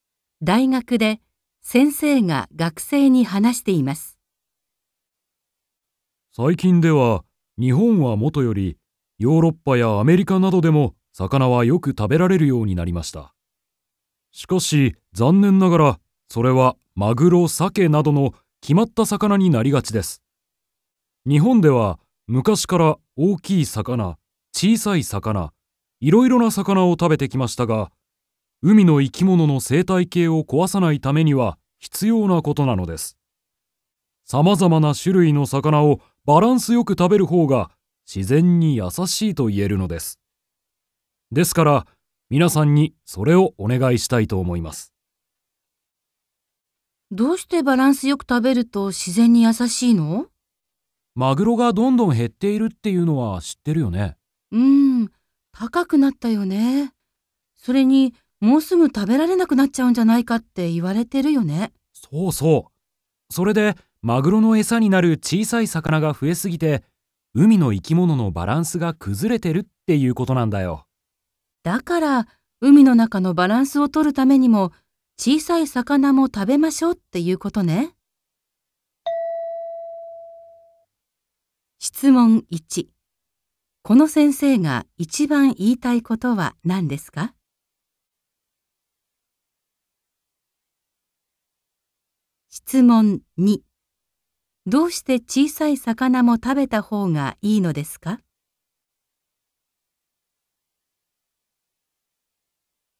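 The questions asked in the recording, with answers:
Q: この先生が一番言いたいことは何ですか?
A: いろいろな種類の魚をバランスよく食べてほしい

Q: どうして小さい魚も食べた方がいいのですか?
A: 海の生き物のバランスを取るため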